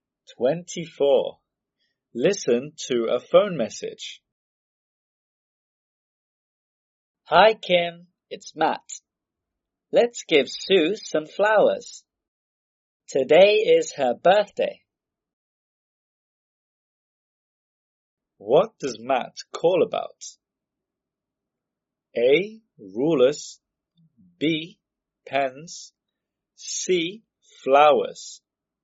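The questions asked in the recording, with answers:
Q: What does Matt call about?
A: C: Flowers.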